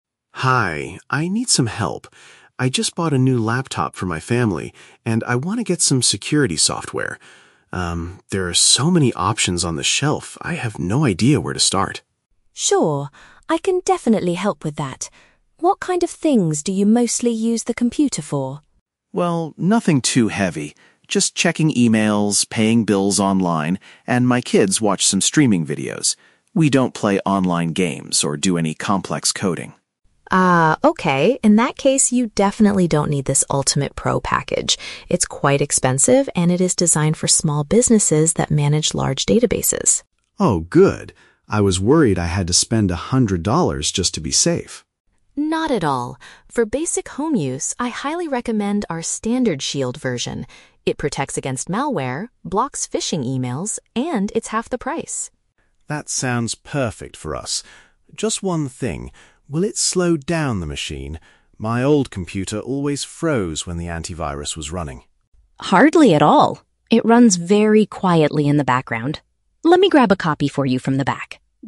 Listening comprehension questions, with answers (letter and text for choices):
Listen to the conversation between a customer and a computer store employee, and choose the correct answer (A, B, or C) for each question.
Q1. Why is the man looking for a security program?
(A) He wants to secure his company's large database.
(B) He needs it for everyday family activities online.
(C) His laptop is currently infected with a dangerous virus.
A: (B) He needs it for everyday family activities online.

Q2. Why does the assistant advise him NOT to buy the "Ultimate Pro" box?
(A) It is intended for commercial workplaces, not regular homes.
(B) It does not include protection against scam email messages.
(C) It is currently out of stock in the computer store.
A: (A) It is intended for commercial workplaces, not regular homes.

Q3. What final concern does the customer have before purchasing?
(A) He is worried the software will require a monthly fee.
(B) He is afraid the program will affect the laptop's speed.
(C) He wonders if the installation process will be too difficult.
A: (B) He is afraid the program will affect the laptop's speed.

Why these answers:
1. The customer says he bought a laptop for his family and they use it for "checking emails, paying bills online, and my kids watch some streaming videos." Option B uses the phrase "everyday family activities online" to summarize this. Why the traps are wrong: Option A is a trap; "small businesses" and "databases" are mentioned in the audio, but that is exactly what the man does not need. Option C is a plausible reason to buy antivirus software, but he explicitly states he just bought a new laptop.
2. The employee tells him he doesn't need "Ultimate Pro" because it is "designed for small businesses." Option A uses the synonym phrase "intended for commercial workplaces." Why the traps are wrong: Option B is a trap because the audio mentions blocking phishing (scam) emails, but that is a feature of the Standard version, not a missing feature of the Pro version. Option C is incorrect because she never mentions it being out of stock.
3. Right before buying, the customer asks, "will it slow down the machine?" Option B paraphrases this as affecting "the laptop's speed." Why the traps are wrong: Option A is a trap; money is discussed earlier ("spend a hundred dollars", "half the price"), but he doesn't ask about a monthly fee at the end. Option C is a plausible concern for software buyers, but it is never mentioned in this conversation.

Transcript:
Customer: Hi, I need some help. I just bought a new laptop for my family, and I want to get some security software. Um, there are so many options on this shelf, I have no idea where to start.
Employee: Sure, I can definitely help with that. What kind of things do you mostly use the computer for?
Customer: Well, nothing too heavy. Just checking emails, paying bills online, and my kids watch some streaming videos. We don't play online games or do any complex coding.
In that case, you definitely don't need this "Ultimate Pro" package. It's quite expensive and it is designed for small businesses that manage large databases.
Customer: Oh, good. I was worried I had to spend a hundred dollars just to be safe.
Employee: Not at all. For basic home use, I highly recommend our "Standard Shield" version. It protects against malware, blocks phishing emails, and it's half the price.
Customer: That sounds perfect for us. Just one thing... will it slow down the machine? My old computer always froze when the antivirus was running.
Employee: Hardly at all. It runs very quietly in the background. Let me grab a copy for you from the back.